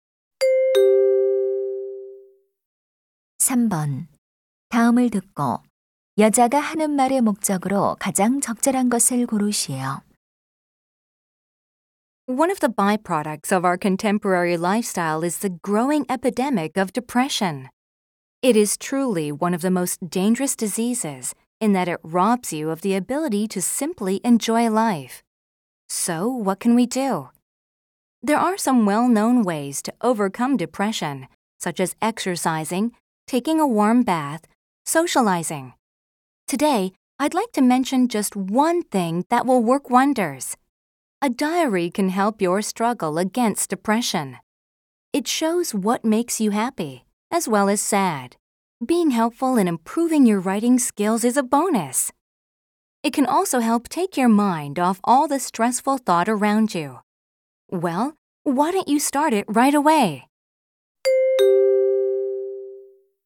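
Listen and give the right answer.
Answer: 우울증 극복을 위해 일기 쓰기를 권장하려고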